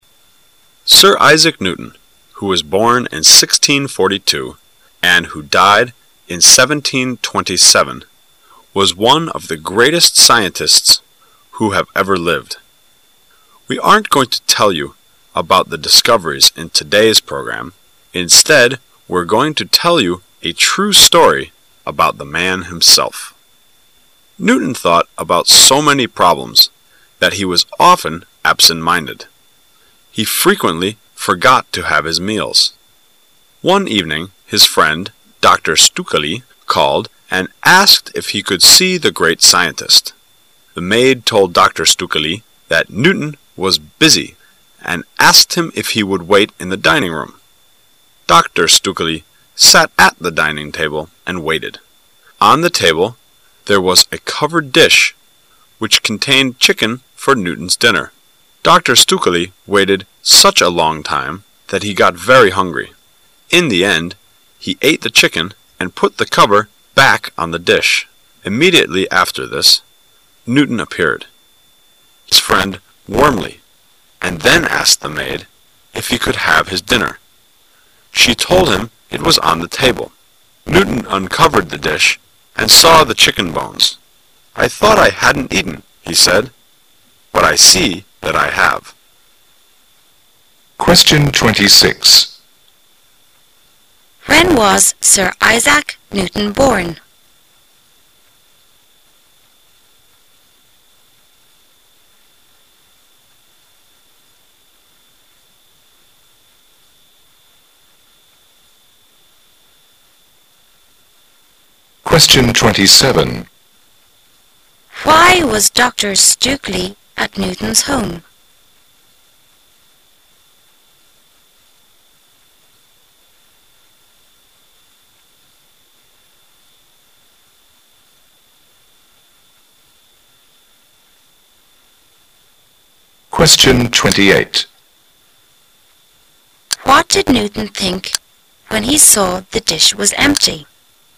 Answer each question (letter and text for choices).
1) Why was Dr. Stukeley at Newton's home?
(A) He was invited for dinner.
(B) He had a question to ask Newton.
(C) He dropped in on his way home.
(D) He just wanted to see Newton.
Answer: (D) He just wanted to see Newton.

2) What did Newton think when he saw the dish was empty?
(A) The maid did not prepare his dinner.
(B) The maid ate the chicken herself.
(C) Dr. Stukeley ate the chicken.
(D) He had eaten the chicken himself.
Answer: (D) He had eaten the chicken himself.

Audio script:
[解析] 26-28 Sir Isaac Newton, who was born in 1642 and who died in 1727, was one of the greatest scientists who have ever lived. We aren't going to tell you about his discoveries in today's programme, instead, we're going to tell you a true story about the man himself. Newton thought about so many problems that he was often absent-minded. He frequently forgot to have his meals. One evening his friend, Dr. Stukeley, called and asked if he could see the great scientist. The maid told Dr. Stukeley that Newton was busy and asked him if he would wait in the dining-room. Dr. Stukeley sat at the dining-table and waited. On the table there was a covered dish which contained a chicken for Newton's dinner. Dr. Stukeley waited such a long time that he got very hungry. In the end he ate the chicken and put the cover back on the dish. Immediately after this, Newton appeared. He greeted his friend warmly and then asked the maid if he could have his dinner. She told him it was on the table. Newton uncovered the dish and saw the chicken bones. "I thought I hadn't eaten," he said, "but I see that I have." 26. When was Sir Isaac Newton born?